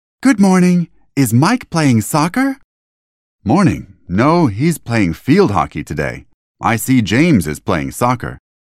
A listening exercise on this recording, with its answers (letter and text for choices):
«باتوجه به فایل صوتی جملات را به ترتیب بنویسید»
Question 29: Is Mike playing soccer?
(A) No, he is playing tennis.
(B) No, he is playing field hockey.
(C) No, he is playing table tennis.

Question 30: What's James doing?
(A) He's playing soccer.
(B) He's playing field hockey.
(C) He's playing table tennis.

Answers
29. (B) No, he is playing field hockey.
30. (A) He's playing soccer.